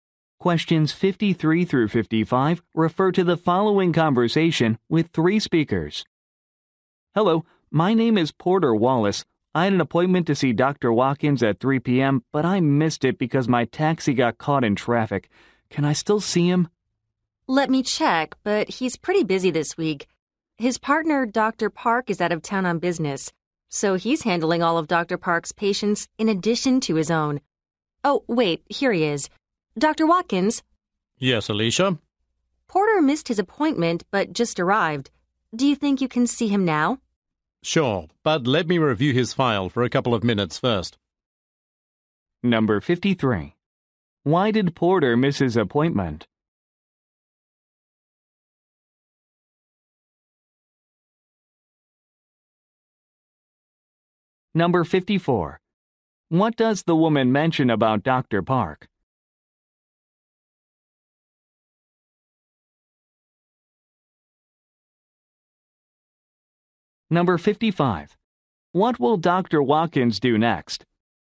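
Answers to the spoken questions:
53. His taxi got caught in traffic
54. He is out of town on business
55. Review Porter's file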